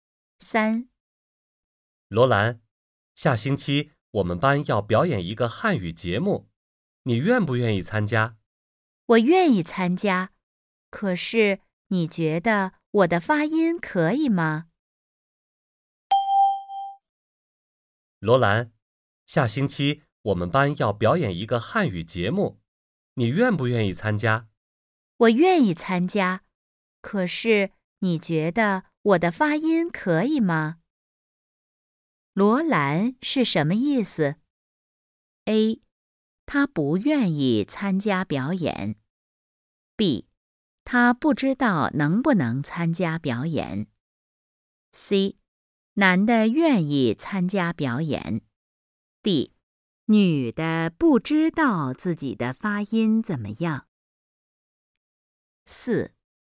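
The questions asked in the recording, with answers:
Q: 罗兰是什么意思?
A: D: 女的不知道自己的发音怎么样。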